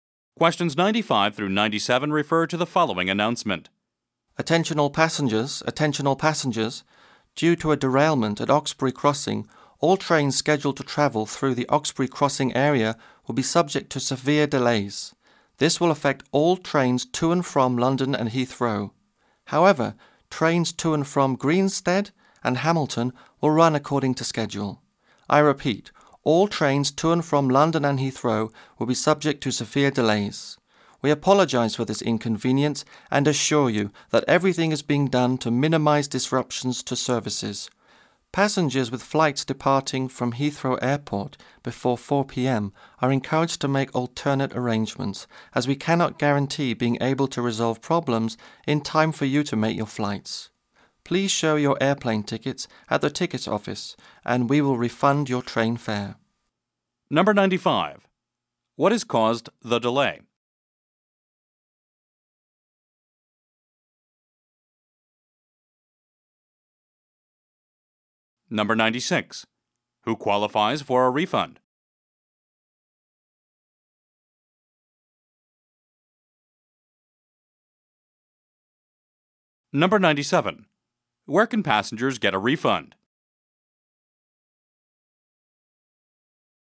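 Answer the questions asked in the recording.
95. A derailment at Oxbury Crossing
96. Passengers with flights leaving Heathrow before 4 p.m.
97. At the ticket office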